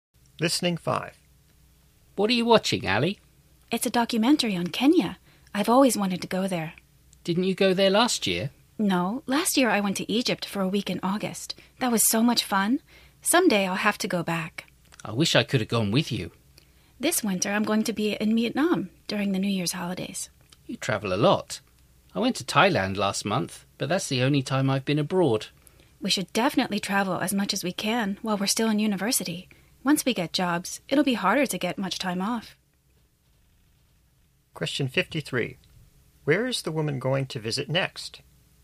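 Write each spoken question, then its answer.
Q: Where is the woman going to visit next?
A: Vietnam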